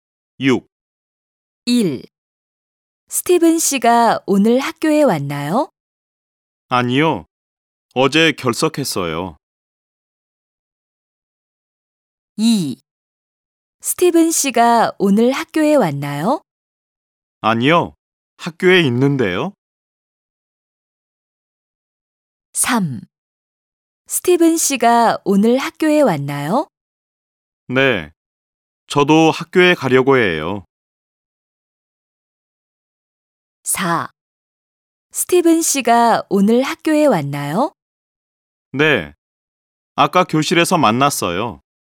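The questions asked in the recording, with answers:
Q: 스티븐 씨가 오늘 학교에 왔나요?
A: 4: 네. 아까 교실에서 만났어요.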